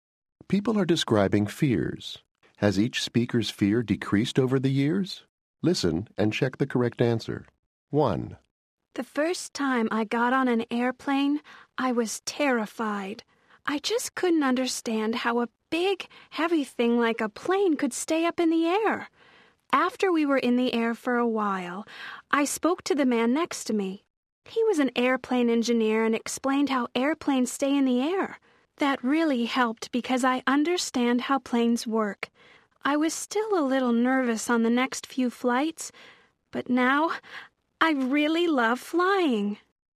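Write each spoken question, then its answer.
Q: Has each speaker's fear decreased over the years?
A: Yes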